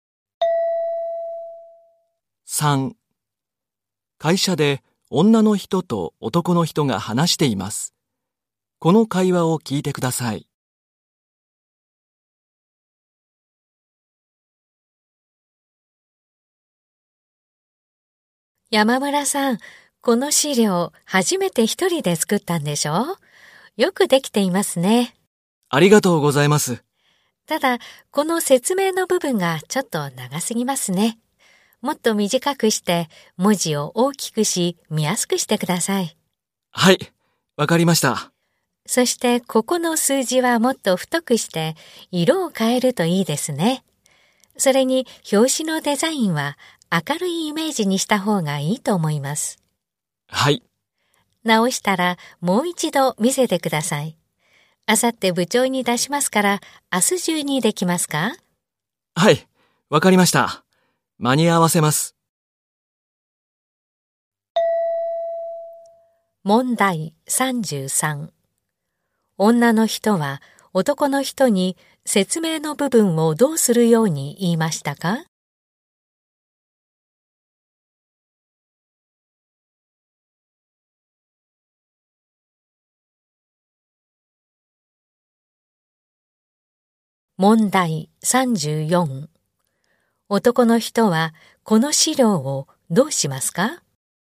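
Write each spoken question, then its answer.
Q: 女の人は男の人に説明の部分をどうするように言いましたか?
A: もっと短くして文字を大きくする

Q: 男の人はこの資料をどうしますか?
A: 明日中に直してもう一度見せる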